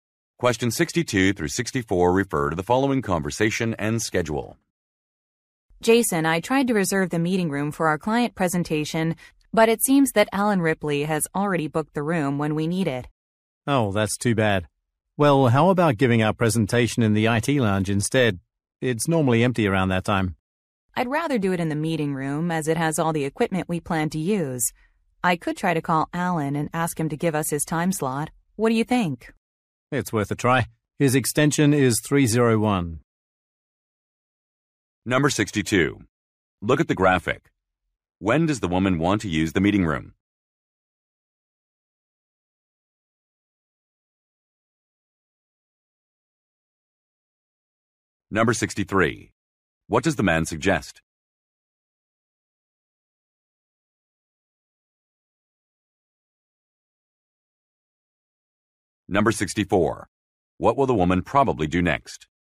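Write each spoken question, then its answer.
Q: What does the man suggest?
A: Giving the presentation in the IT lounge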